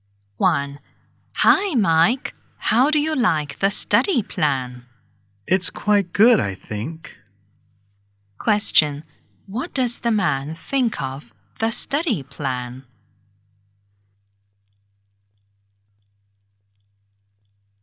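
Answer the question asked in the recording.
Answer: It's quite good.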